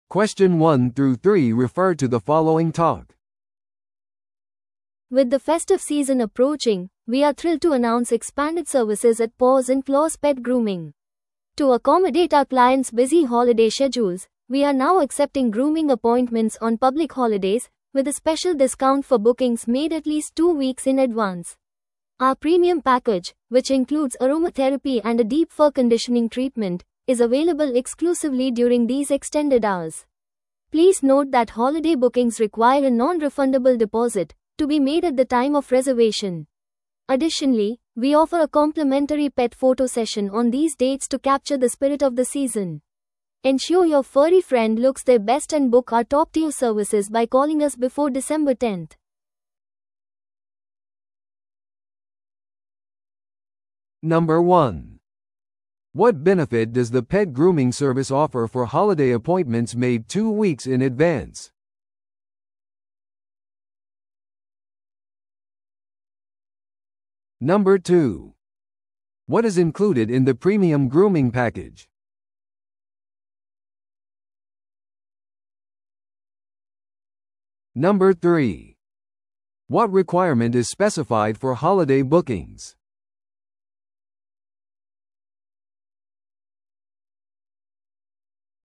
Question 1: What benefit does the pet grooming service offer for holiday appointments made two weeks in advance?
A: 特別割引

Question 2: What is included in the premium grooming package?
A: アロマセラピーと深層毛髪トリートメント

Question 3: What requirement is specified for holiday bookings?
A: 返金不可のデポジット

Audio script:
With the festive season approaching, we are thrilled to announce expanded services at Paws and Claws Pet Grooming. To accommodate our clients' busy holiday schedules, we are now accepting grooming appointments on public holidays, with a special discount for bookings made at least two weeks in advance. Our premium package, which includes aromatherapy and a deep fur conditioning treatment, is available exclusively during these extended hours. Please note that holiday bookings require a non-refundable deposit, to be made at the time of reservation. Additionally, we offer a complimentary pet photo session on these dates to capture the spirit of the season. Ensure your furry friend looks their best and book our top-tier services by calling us before December 10th.